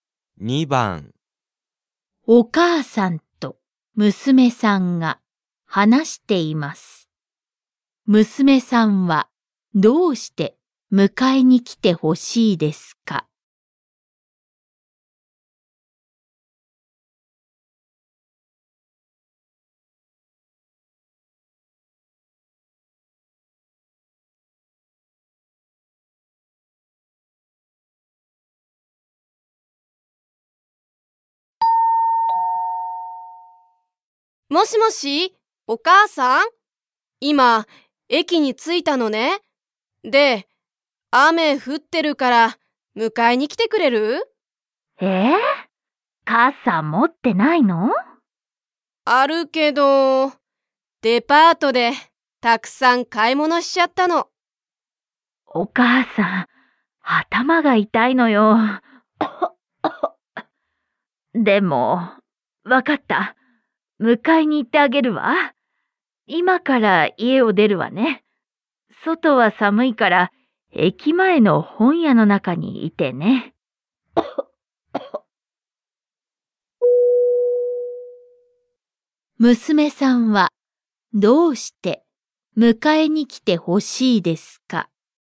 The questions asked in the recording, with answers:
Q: 娘さんは、どうして迎えに来てほしいですか?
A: たくさん買い物したから.